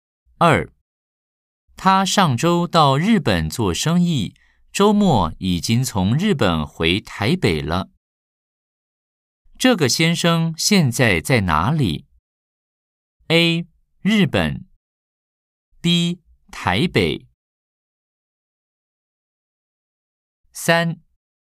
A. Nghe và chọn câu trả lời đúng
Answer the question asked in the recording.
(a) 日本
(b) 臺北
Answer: (b) 臺北

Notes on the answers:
他上周到日本做生意,週末已經從日本回台北了。